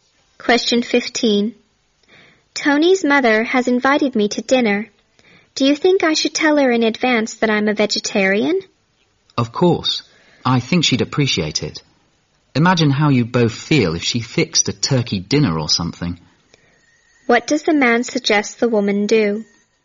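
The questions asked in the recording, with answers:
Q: What does the man suggest the woman do?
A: Tell Tony's mother in advance that she is a vegetarian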